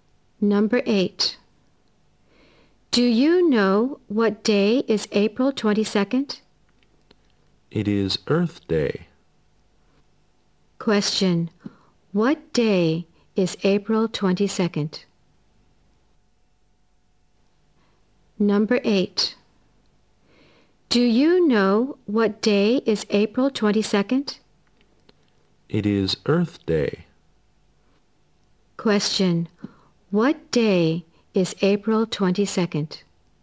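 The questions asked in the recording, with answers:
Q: What day is April 22nd?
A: Earth Day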